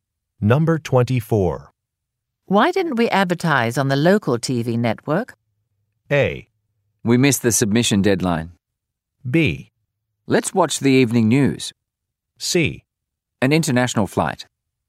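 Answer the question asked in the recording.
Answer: A: We missed the submission deadline.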